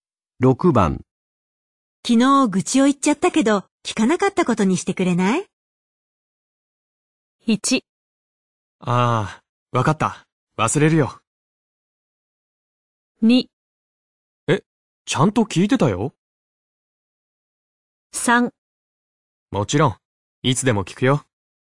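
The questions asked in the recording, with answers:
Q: 昨日愚痴を言っちゃったけど、聞かなかったことにしてくれない?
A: 1: ああ、わかった。忘れるよ。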